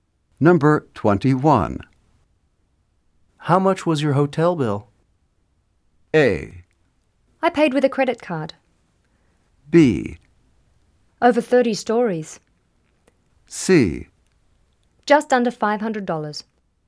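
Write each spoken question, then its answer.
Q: How much was your hotel bill?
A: C: Just under $500.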